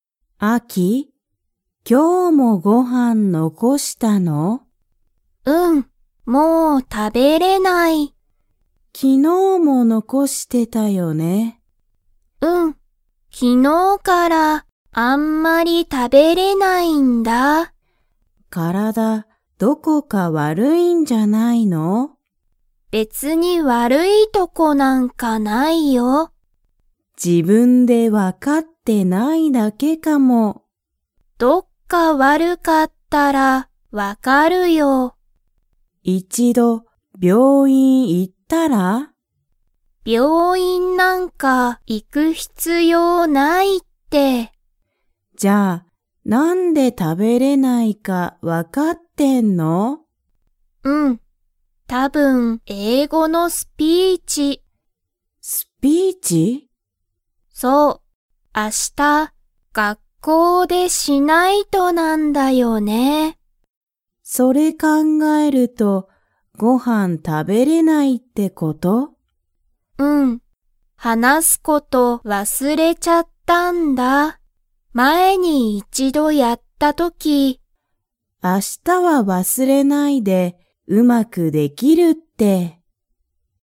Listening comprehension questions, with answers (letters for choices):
Comprehension Quiz (Skip if you don't understand the conversation yet)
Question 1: アキは、病院(びょういん)に行(い)きますか?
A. はい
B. いいえ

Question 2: アキは、明日あした)____でスピーチがある。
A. 会社(かいしゃ)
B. 有名(ゆうめい)なお店(みせ)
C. 家(いえ)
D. 学校(がっこう)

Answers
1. B
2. D

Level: Level 2